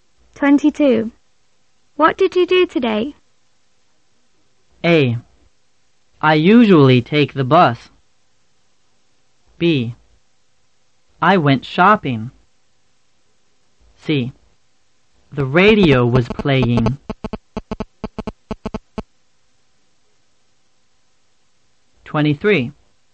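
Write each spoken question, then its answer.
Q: What did you do today?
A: B: I went shopping.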